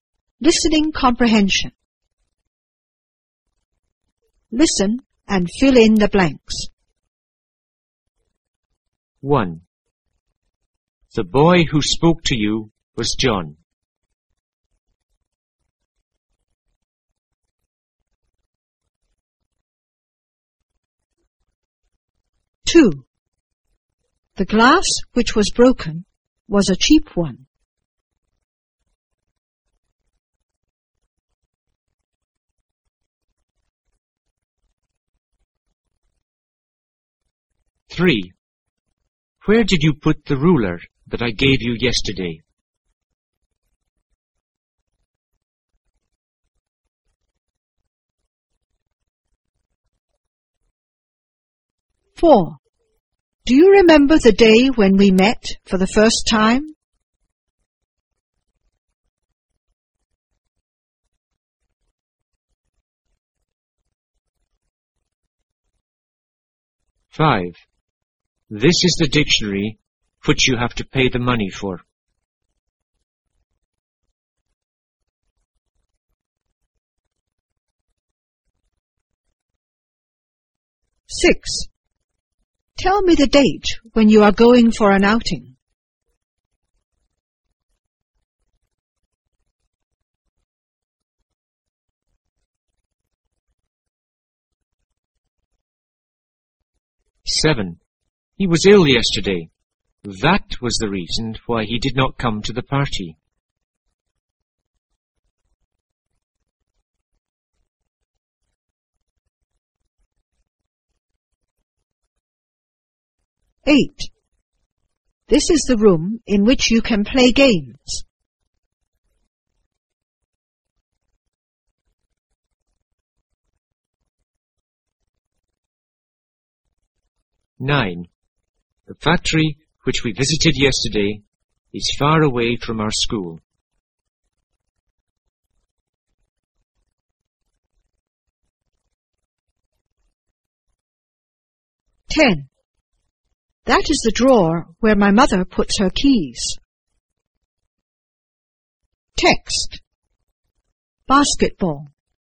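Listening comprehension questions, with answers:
Listen and fill in the blanks.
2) The glass__was a cheap one.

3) Where did you put the ruler__yesterday.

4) Do you remember the day__for the first time?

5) This is the dictionary__you have to pay the money__.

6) Tell me the date __for an outing.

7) He was ill yesterday.That was the reason__to the party.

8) This is the room__games.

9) The factory__is far away from our school.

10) That is the drawer__puts her keys.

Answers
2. which was broken
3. that I gave you
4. when we met
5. which; for
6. when you are going
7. why he did not come
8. in which you can play
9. which we visited yesterday
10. where my mother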